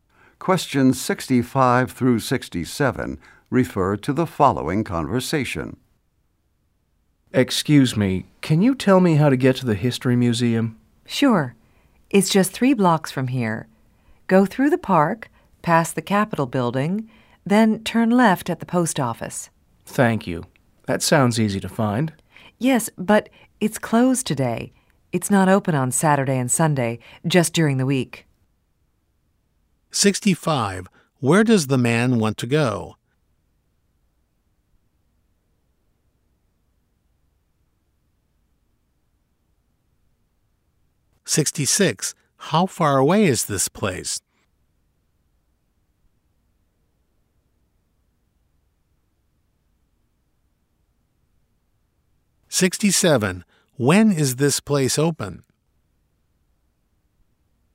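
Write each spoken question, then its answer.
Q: Where does the man want to go?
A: The History Museum

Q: How far away is this place?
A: Three blocks

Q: When is this place open?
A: During the week (weekdays)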